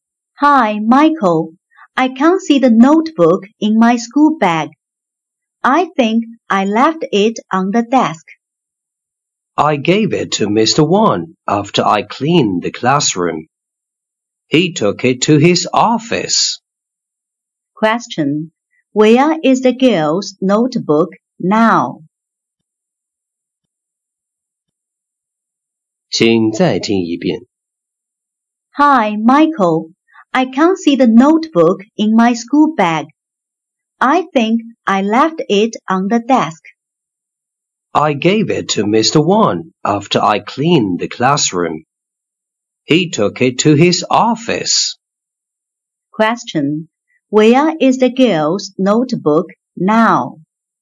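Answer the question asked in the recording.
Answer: In Mr. Wan's office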